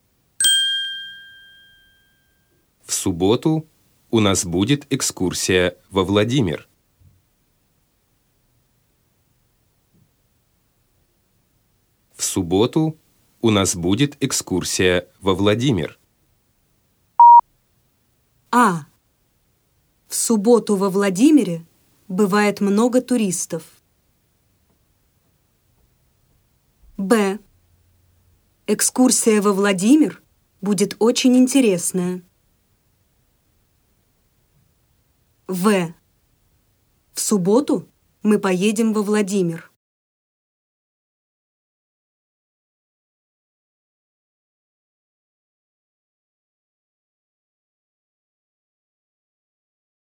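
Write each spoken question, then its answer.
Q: В субботу у нас будет экскурсия во Владимир.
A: В: В субботу мы поедем во Владимир.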